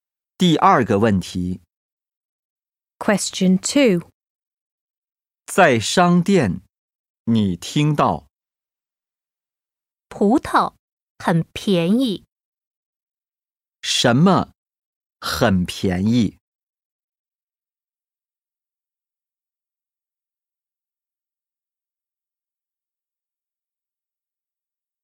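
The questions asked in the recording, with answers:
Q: 什么很便宜?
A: 葡萄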